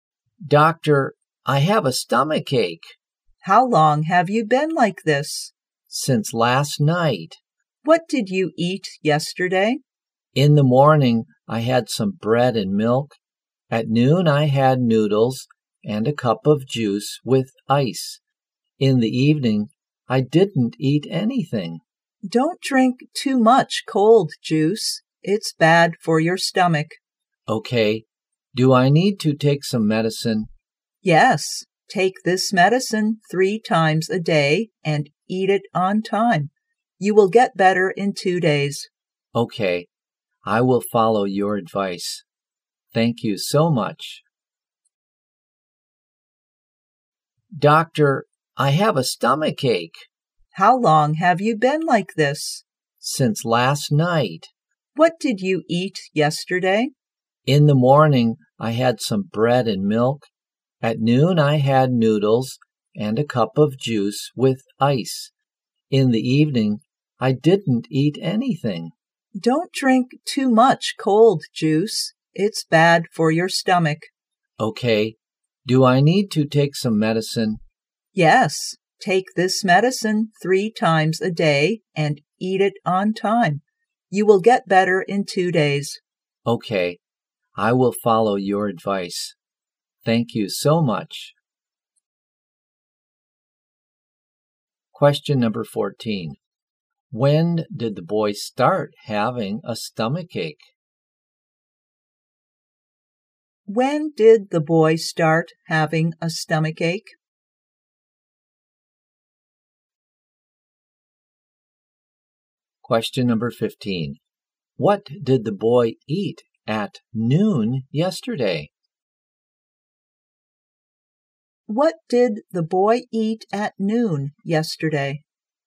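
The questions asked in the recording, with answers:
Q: When did the boy start having a stomach ache?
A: Since last night

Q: What did the boy eat at noon yesterday?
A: Noodles and a cup of juice with ice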